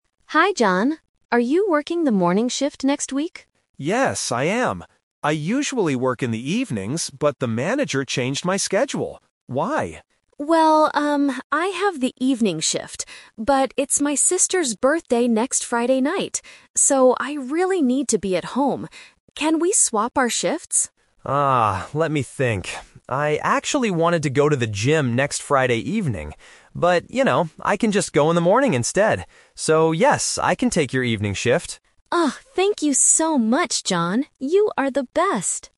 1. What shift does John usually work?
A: The evening shift

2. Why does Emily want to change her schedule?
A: She has a family birthday party.

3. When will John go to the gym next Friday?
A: In the morning

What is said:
Emily: Hi, John. Are you working the morning shift next week?
John: Yes, I am. I usually work in the evenings, but the manager changed my schedule. Why?
Emily: Well, um, I have the evening shift. But it's my sister's birthday next Friday night. So, I really need to be at home. Can we swap our shifts?
John: Ah, let me think. I actually wanted to go to the gym next Friday evening. But, you know, I can just go in the morning instead. So, yes, I can take your evening shift.